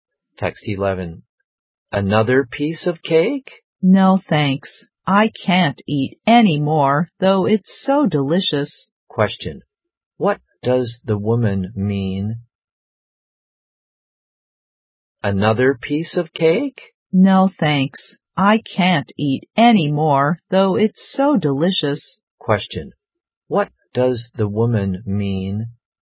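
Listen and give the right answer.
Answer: She doesn't want any more cake; she is full.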